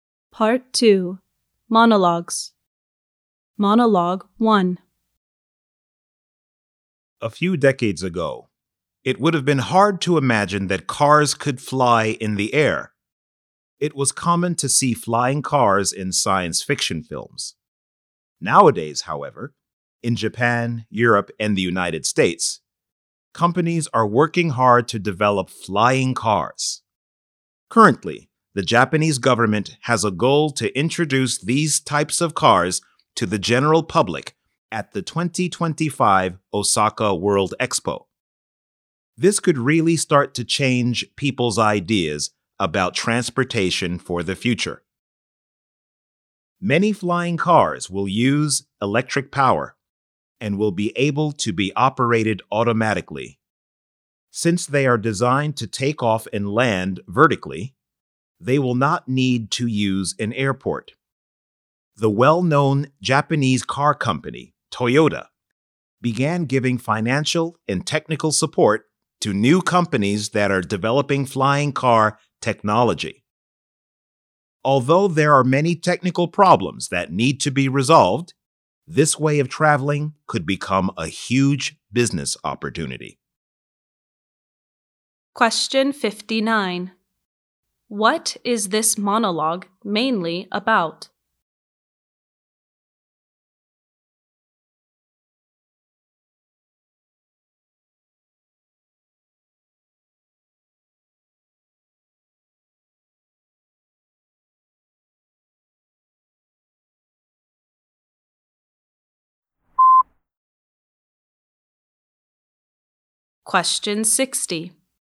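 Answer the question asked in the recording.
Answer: The development of flying cars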